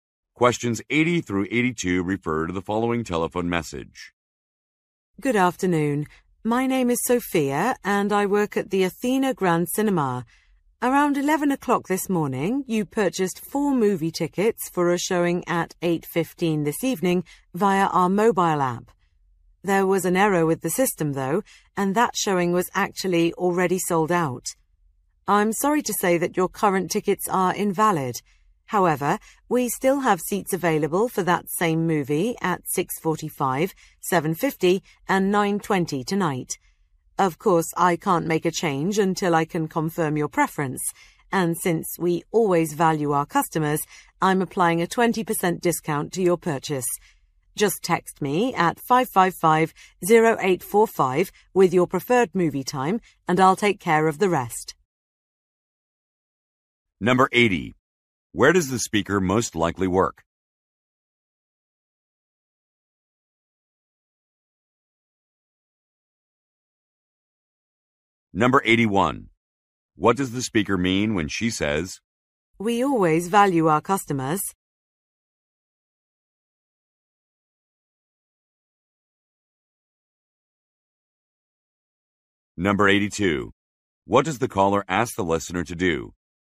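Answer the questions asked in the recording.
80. At a movie theater
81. She is offering a 20% discount to make up for the error
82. Text her their preferred movie time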